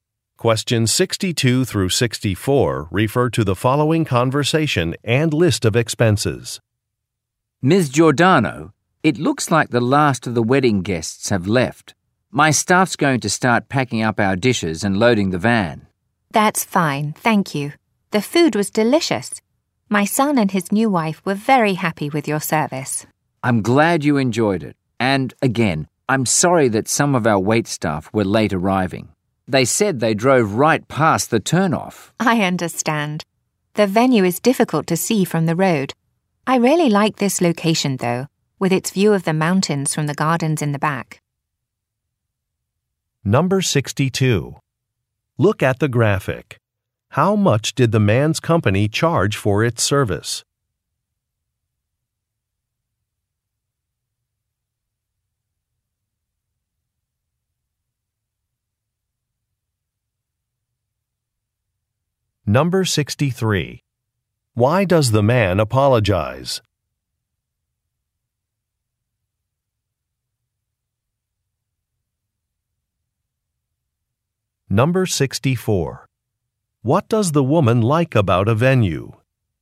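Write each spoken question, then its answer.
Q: Why does the man apologize?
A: Some wait staff arrived late

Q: What does the woman like about a venue?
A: The mountain view from the gardens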